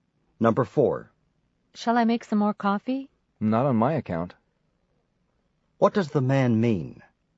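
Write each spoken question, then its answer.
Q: What does the man mean?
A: He doesn't want more coffee.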